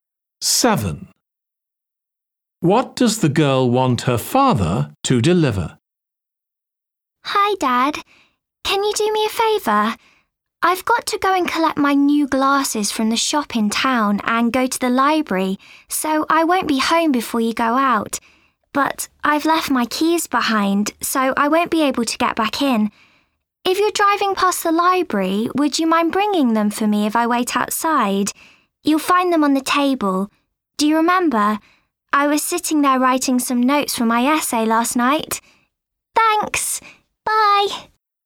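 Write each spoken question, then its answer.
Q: What does the girl want her father to deliver?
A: her keys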